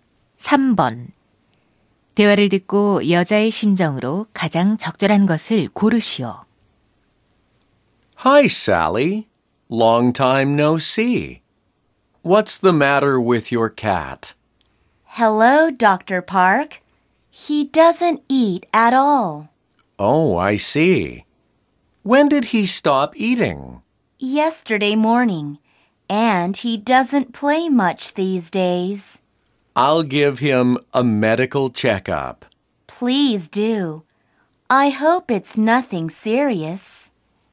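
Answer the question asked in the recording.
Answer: 걱정스러운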